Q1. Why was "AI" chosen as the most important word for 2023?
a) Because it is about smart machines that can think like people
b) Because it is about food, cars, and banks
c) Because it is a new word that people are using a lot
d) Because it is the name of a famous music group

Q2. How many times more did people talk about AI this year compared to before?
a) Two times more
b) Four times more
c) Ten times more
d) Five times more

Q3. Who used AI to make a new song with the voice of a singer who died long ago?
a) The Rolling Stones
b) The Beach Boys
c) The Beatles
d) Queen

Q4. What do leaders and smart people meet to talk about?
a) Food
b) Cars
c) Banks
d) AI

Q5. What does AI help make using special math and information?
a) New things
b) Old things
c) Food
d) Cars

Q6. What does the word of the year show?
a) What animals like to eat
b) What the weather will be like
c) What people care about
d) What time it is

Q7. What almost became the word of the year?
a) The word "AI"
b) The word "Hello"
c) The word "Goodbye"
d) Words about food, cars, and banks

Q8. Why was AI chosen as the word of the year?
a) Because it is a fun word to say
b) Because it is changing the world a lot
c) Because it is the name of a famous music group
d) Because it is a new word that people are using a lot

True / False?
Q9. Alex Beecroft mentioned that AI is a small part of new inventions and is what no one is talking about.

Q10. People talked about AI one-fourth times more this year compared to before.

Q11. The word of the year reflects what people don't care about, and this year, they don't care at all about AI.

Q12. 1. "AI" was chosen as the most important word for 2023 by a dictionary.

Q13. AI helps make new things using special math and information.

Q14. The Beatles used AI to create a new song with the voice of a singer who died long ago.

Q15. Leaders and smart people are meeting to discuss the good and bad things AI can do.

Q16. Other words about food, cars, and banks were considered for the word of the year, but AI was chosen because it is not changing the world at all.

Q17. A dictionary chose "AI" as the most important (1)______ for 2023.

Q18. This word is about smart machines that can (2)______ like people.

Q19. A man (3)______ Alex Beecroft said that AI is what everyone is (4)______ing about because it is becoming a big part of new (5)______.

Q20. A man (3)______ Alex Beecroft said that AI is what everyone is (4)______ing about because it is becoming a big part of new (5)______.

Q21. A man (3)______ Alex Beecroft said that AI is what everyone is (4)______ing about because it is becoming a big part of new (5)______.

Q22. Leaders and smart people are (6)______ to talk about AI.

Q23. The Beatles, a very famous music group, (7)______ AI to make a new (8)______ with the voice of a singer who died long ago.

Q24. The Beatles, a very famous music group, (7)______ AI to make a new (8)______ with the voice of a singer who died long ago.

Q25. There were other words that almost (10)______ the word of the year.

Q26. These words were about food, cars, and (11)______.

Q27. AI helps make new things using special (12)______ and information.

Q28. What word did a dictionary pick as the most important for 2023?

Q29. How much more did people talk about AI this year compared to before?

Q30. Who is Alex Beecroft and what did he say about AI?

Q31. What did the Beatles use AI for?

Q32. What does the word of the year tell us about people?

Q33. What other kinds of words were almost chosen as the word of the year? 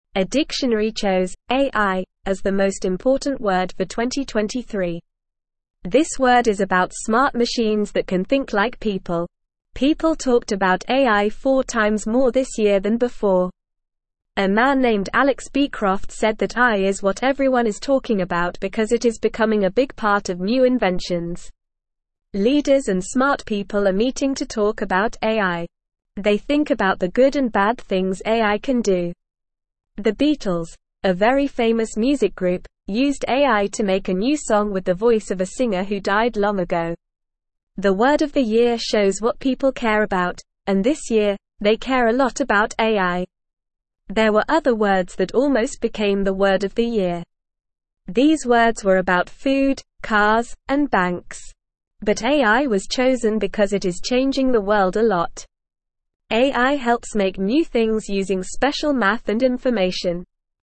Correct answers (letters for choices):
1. a
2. b
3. c
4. d
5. a
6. c
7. d
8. b
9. False
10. False
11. False
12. True
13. True
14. True
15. True
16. False
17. word
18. think
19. named
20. talk
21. inventions
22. meeting
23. used
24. song
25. became
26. banks
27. math
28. The dictionary picked "AI" as the most important word for 2023.
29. People talked about AI four times more this year than they did before.
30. Alex Beecroft is a person who said that AI is what everyone is talking about because it is a big part of new inventions.
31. The Beatles used AI to make a new song with the voice of a singer who died long ago.
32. The word of the year tells us what people care about, and this year, they care a lot about AI.
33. Words about food, cars, and banks were almost chosen as the word of the year.

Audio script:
A dictionary chose "AI" as the most important word for 2023. This word is about smart machines that can think like people. People talked about AI four times more this year than before. A man named Alex Beecroft said that AI is what everyone is talking about because it is becoming a big part of new inventions.
Leaders and smart people are meeting to talk about AI. They think about the good and bad things AI can do. The Beatles, a very famous music group, used AI to make a new song with the voice of a singer who died long ago. The word of the year shows what people care about, and this year, they care a lot about AI.
There were other words that almost became the word of the year. These words were about food, cars, and banks. But AI was chosen because it is changing the world a lot.

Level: Level 2